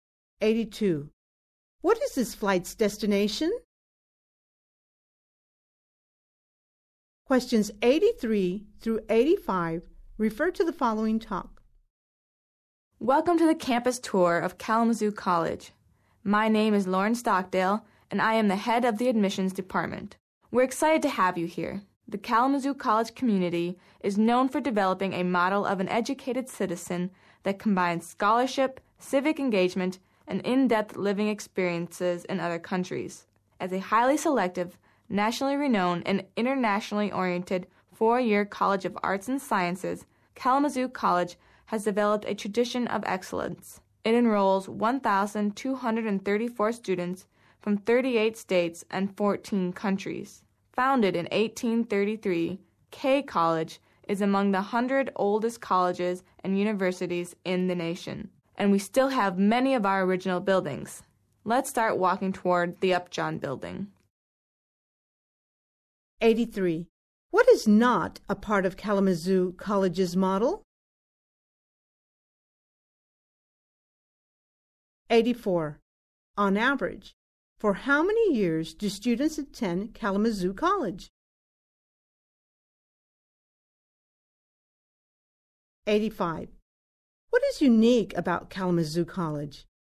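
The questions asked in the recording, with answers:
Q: On average, for how many years do students attend Kalamazoo College?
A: Four years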